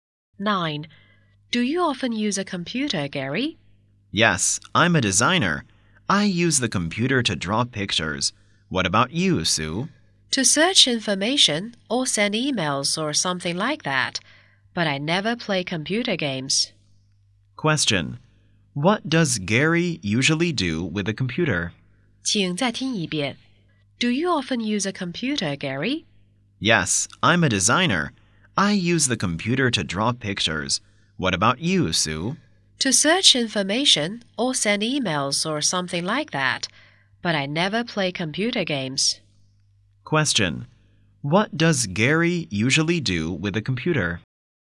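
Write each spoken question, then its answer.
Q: Question. What does Gary usually do with a computer?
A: He draws pictures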